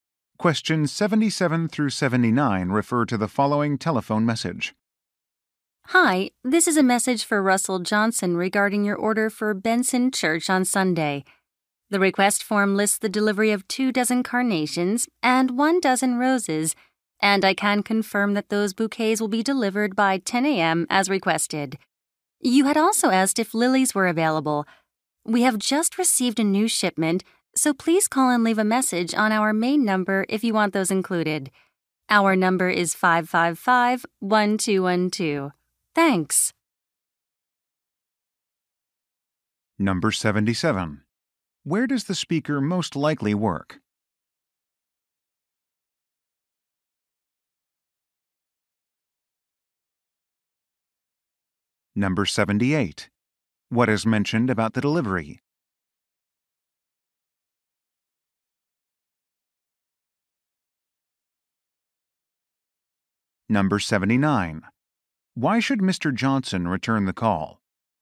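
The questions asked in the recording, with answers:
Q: Where does the speaker most likely work?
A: At a flower shop

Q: What is mentioned about the delivery?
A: It will arrive by 10 a.m. as requested

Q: Why should Mr.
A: To say if he wants lilies included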